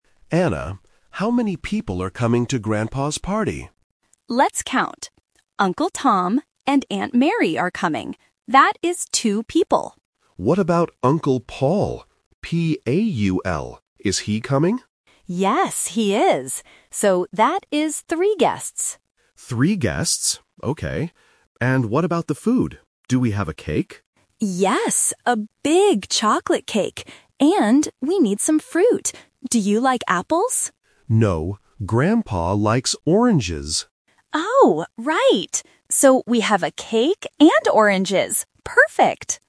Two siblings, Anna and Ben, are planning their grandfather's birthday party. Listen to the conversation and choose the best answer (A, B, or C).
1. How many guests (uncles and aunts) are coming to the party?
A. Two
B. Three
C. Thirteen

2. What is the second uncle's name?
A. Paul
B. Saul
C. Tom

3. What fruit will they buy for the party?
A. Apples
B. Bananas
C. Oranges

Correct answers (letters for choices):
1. B
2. A
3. C

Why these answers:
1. Anna mentions Uncle Tom and Aunt Mary (two people), then Ben asks about Uncle Paul. Anna confirms "So, that is three guests." Option C (Thirteen) is a phonetic trap for the number 3.
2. Ben spells the name clearly: P-A-U-L. Option C (Tom) is the first uncle mentioned, not the one being spelled.
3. Anna suggests apples (Option A - The Trap), but Ben says "No, Grandpa likes oranges" and spells it out. The final decision is oranges.

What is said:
Ben: Anna, how many people are coming to Grandpa's party?
Anna: Let's count. Uncle Tom and Aunt Mary are coming. That is two people.
Ben: What about Uncle Paul? P-A-U-L. Is he coming?
Anna: Yes, he is. So, that is three guests.
Ben: Three guests. Okay. And what about the food? Do we have a cake?
Anna: Yes, a big chocolate cake. And we need some fruit. Do you like apples?
Ben: No, Grandpa likes oranges.
Anna: Oh, right! So, we have a cake and oranges. Perfect!